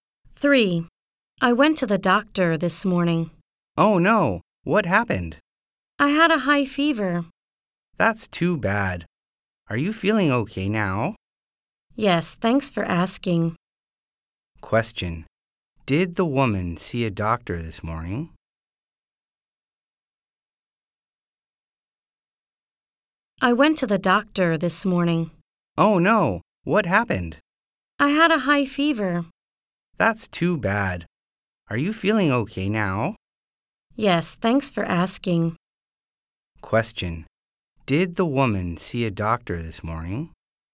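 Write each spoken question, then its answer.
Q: Did the woman see a doctor this morning?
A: Yes, she did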